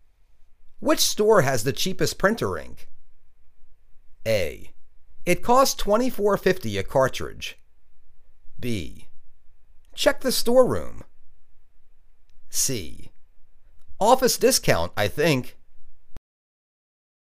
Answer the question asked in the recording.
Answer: Office Discount, I think.